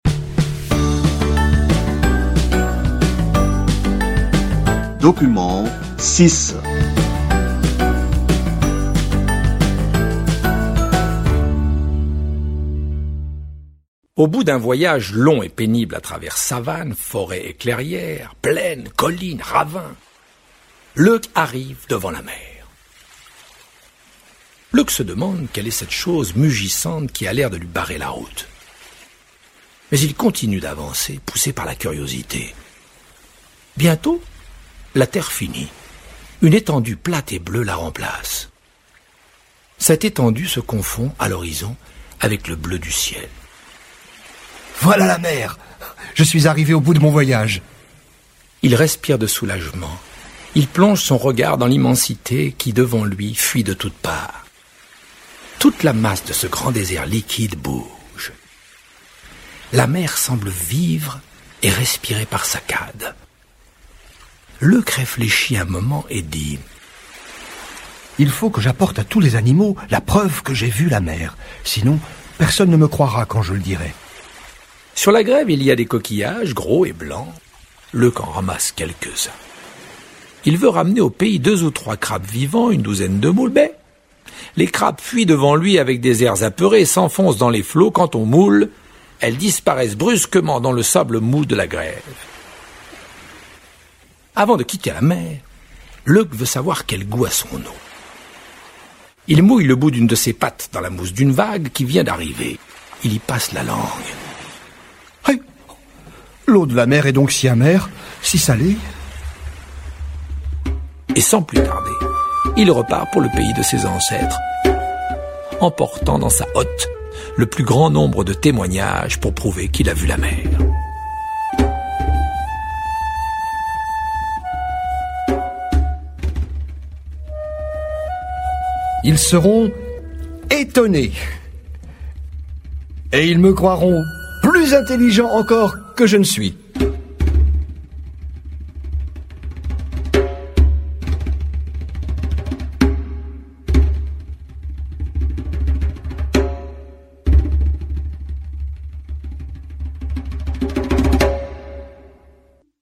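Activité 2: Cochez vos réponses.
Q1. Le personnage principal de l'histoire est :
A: Leuk le lièvre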